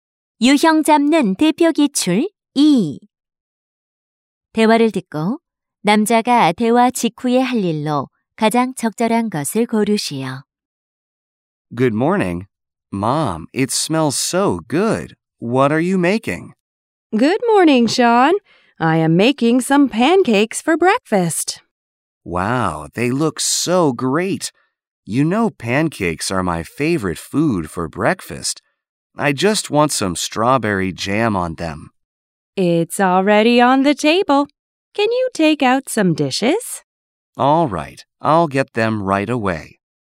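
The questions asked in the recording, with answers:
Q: 대화를 듣고 남자가 대화 직후에 할 일로 가장 적절한 것을 고르시오.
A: 접시 꺼내기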